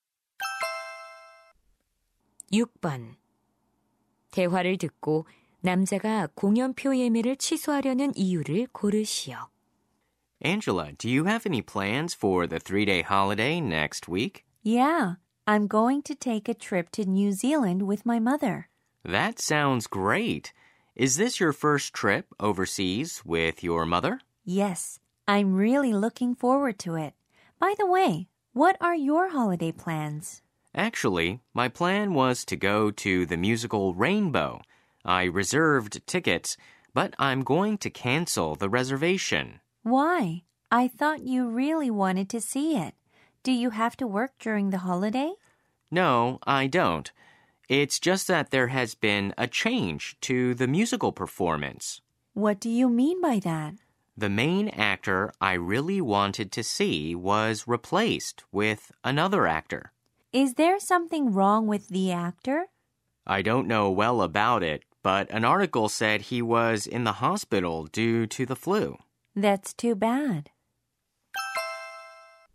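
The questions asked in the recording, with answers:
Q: 대화를 듣고 남자가 공연표 예매를 취소하려는 이유를 고르시오.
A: 보고 싶던 주연 배우가 교체되어서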